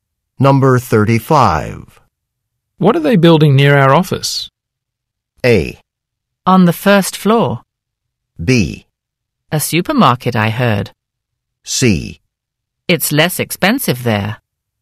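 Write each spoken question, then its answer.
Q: What are they building near our office?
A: B: A supermarket, I heard.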